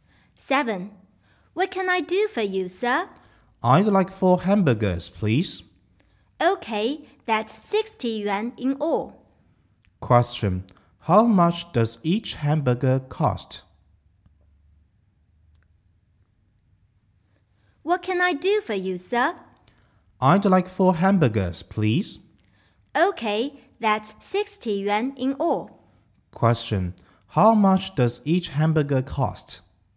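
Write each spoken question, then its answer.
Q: How much does each hamburger cost?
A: 15 yuan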